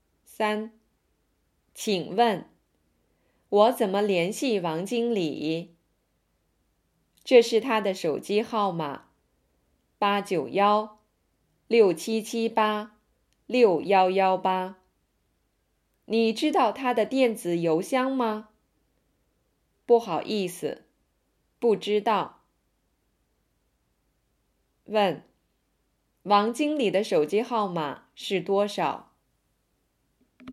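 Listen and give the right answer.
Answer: 891-677-6118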